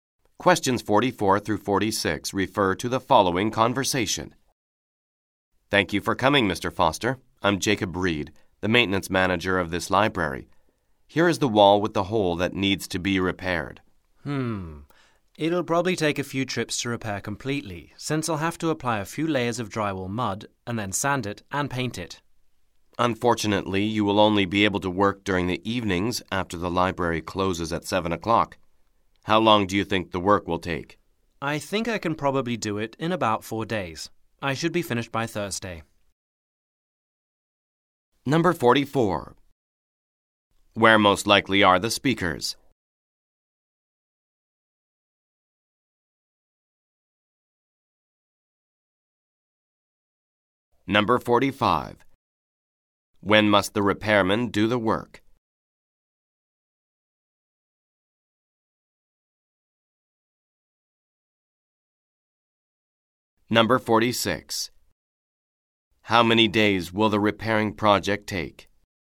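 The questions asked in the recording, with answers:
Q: Where most likely are the speakers?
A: In a library

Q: When must the repairman do the work?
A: In the evenings after the library closes at 7

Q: How many days will the repairing project take?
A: About 4 days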